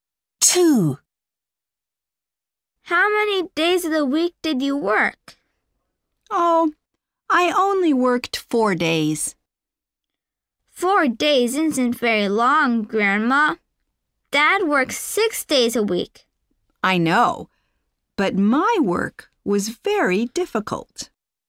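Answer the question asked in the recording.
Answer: 4 days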